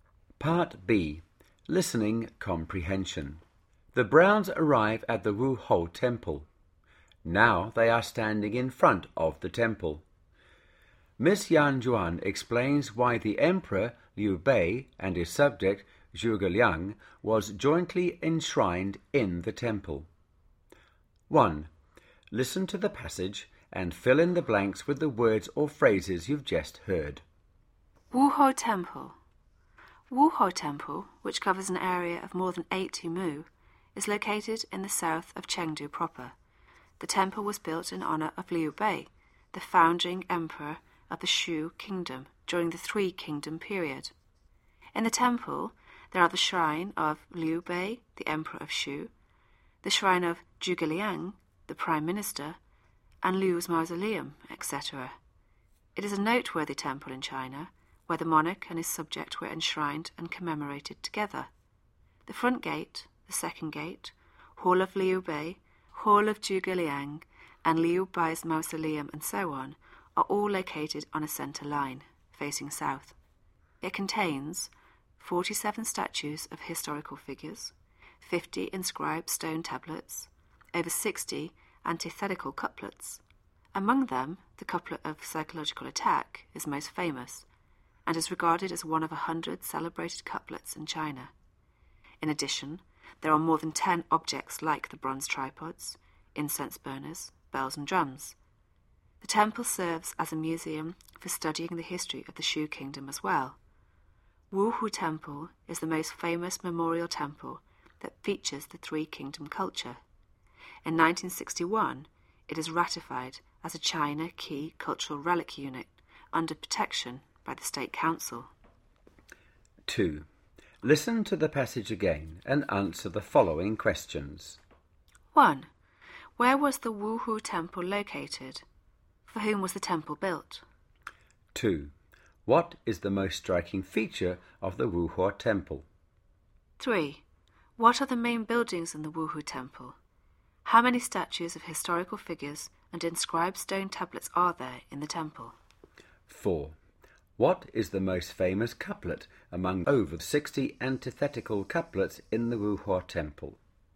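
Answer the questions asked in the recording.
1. In the south of Chengdu proper
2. Liu Bei, the founding emperor of the Shu Kingdom
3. The monarch and his subject are enshrined and commemorated together.
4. The front gate, the second gate, the Hall of Liu Bei, the Hall of Zhuge Liang and Liu Bei's mausoleum
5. 47 statues and 50 stone tablets
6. The couplet of psychological attack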